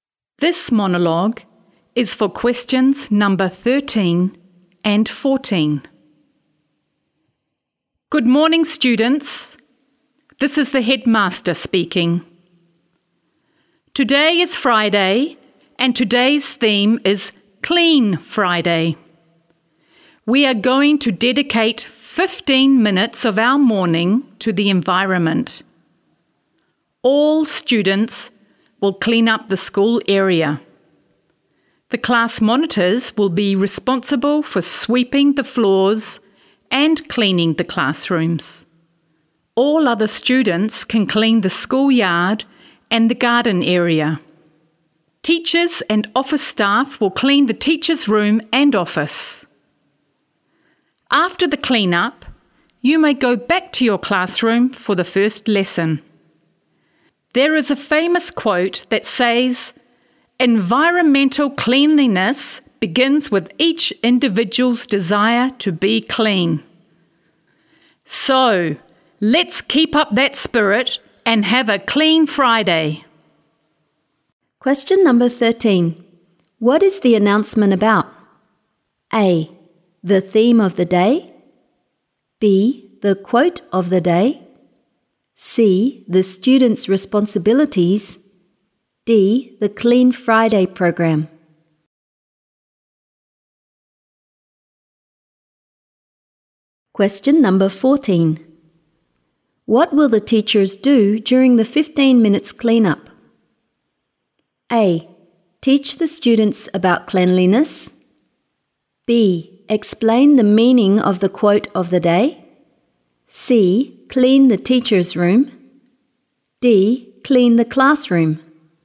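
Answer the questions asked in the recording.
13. D: The Clean Friday program.
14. C: Clean the teacher's room.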